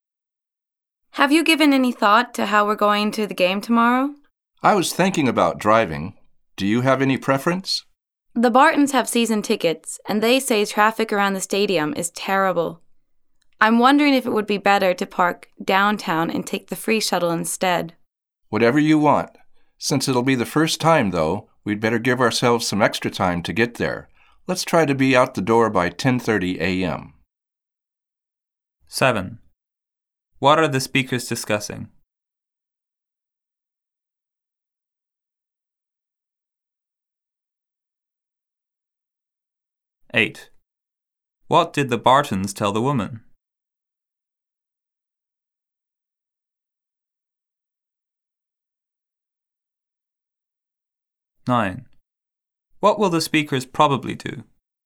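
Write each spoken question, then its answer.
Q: What are the speakers discussing?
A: How they will get to the game tomorrow

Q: What did the Bartons tell the woman?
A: Traffic around the stadium is terrible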